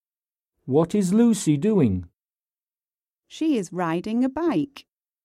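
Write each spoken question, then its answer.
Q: What is Lucy doing?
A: Riding a bike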